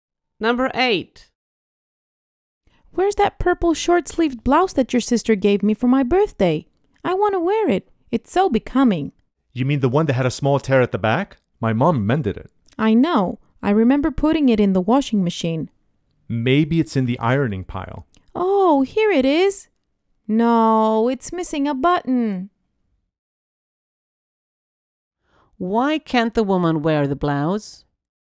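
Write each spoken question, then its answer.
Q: Why can't the woman wear the blouse?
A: It is missing a button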